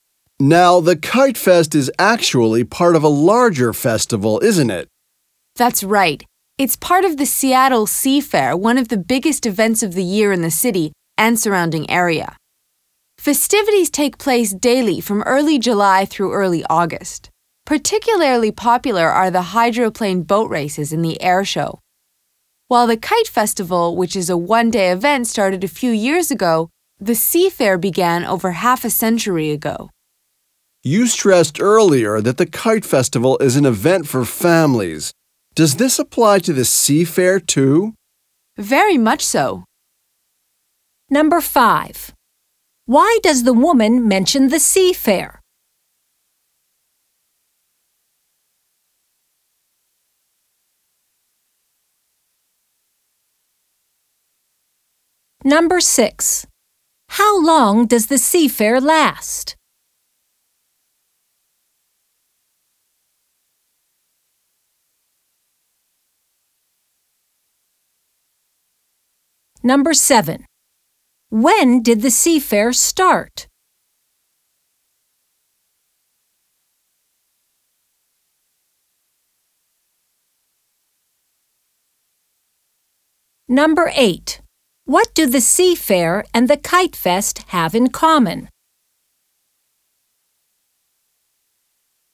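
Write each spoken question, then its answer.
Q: Why does the woman mention the Sea Fair?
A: The Kite Fest is part of the Sea Fair

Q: How long does the Sea Fair last?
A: About a month, from early July to early August

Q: When did the Sea Fair start?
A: Over half a century ago

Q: What do the Sea Fair and the Kite Fest have in common?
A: Both are events for families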